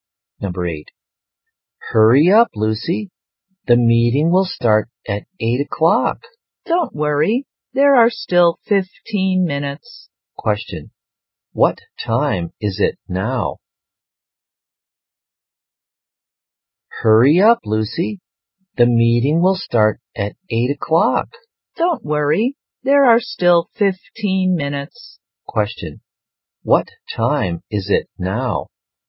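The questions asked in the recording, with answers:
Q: what time is it now?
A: 7:45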